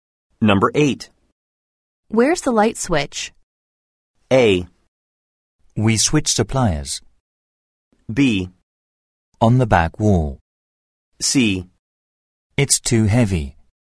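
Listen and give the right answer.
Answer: B: On the back wall.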